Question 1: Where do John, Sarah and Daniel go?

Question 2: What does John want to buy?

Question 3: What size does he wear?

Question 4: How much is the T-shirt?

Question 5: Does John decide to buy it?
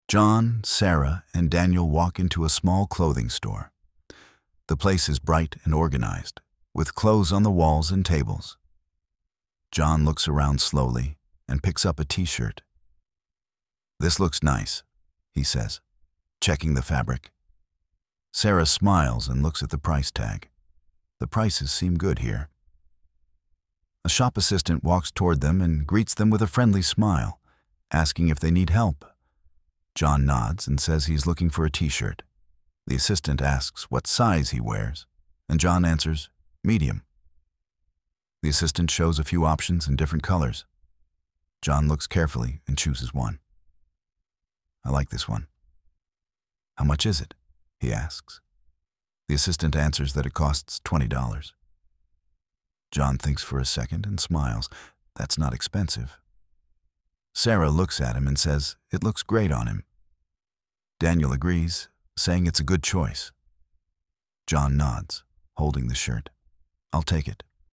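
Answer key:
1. A small clothing store
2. A T-shirt
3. Medium
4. Twenty dollars
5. Yes, he takes it

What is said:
John, Sarah and Daniel walk into a small clothing store. The place is bright and organized, with clothes on the walls and tables.
John looks around slowly and picks up a T-shirt.
This looks nice, he says, checking the fabric.
Sarah smiles and looks at the price tag. The prices seem good here.
A shop assistant walks toward them and greets them with a friendly smile, asking if they need help.
John nods and says he is looking for a T-shirt.
The assistant asks what size he wears, and John answers, medium.
The assistant shows a few options in different colors. John looks carefully and chooses one.
I like this one. How much is it? he asks.
The assistant answers that it costs twenty dollars.
John thinks for a second and smiles. That's not expensive.
Sarah looks at him and says it looks great on him.
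Daniel agrees, saying it's a good choice.
John nods, holding the shirt.
I'll take it.

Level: Inglês Básico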